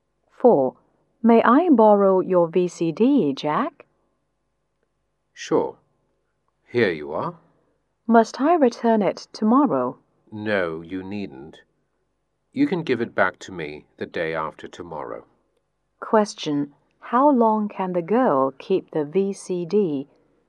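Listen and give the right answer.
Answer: Two days, until the day after tomorrow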